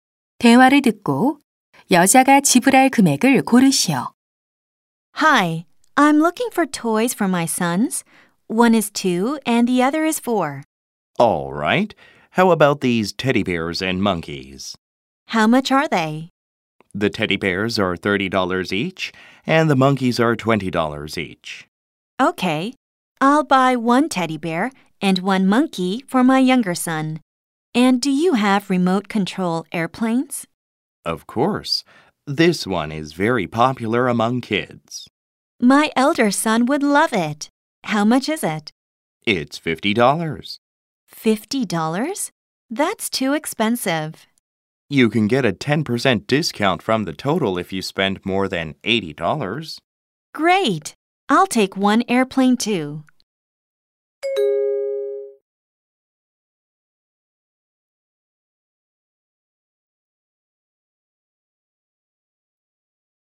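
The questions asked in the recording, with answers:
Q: 대화를 듣고 여자가 지불할 금액을 고르시오.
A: 90달러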